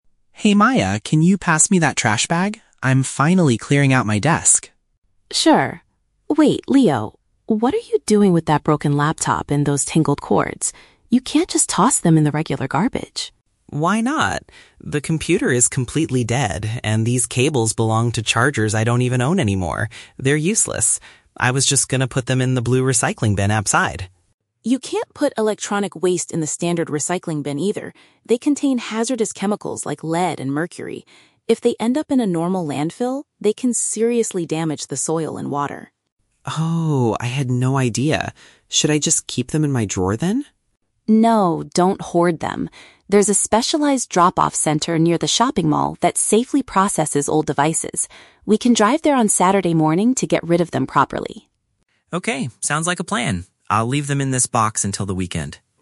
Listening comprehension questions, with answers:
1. What did Leo initially intend to do with his old electronics?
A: Place them in the household recycling container.

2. Why does Maya stop Leo from throwing away the laptop?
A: Because it contains toxic materials that can harm the environment.

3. How will the siblings solve the problem?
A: They will take the items to a specific disposal facility.

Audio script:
Leo: Hey Maya, can you pass me that trash bag? I'm finally clearing out my desk.
Maya: Sure... Wait, Leo, what are you doing with that broken laptop and those tangled cords? You can't just toss them in the regular garbage!
Leo: Why not? The computer is completely dead, and these cables belong to chargers I don't even own anymore. They're useless. I was just going to put them in the blue recycling bin outside.
Maya: You can't put electronic waste in the standard recycling bin either. They contain hazardous chemicals like lead and mercury. If they end up in a normal landfill, they can seriously damage the soil and water.
Leo: Oh, I had no idea. Should I just keep them in my drawer then?
Maya: No, don't hoard them. There's a specialized drop-off center near the shopping mall that safely processes old devices. We can drive there on Saturday morning to get rid of them properly.